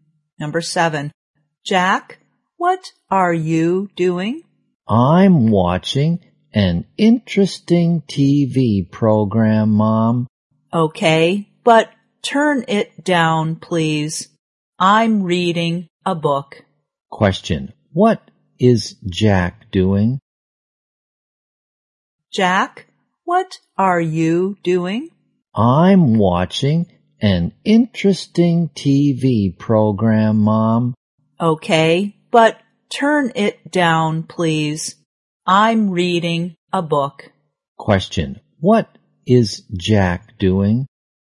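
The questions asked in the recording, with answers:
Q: What is Jack doing?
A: Watching a TV program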